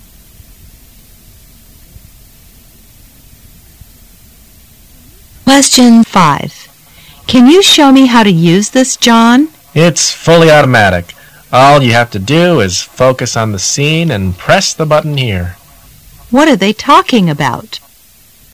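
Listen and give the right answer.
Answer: A camera.

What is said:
[解析] W: Can you show me how to use this, John? M: It's fully automatic. All you have to do is focus on the scene and press the button here. Q: What are they talking about?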